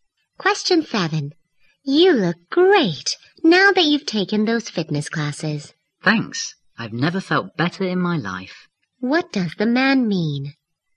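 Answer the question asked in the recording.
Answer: He has never felt better in his life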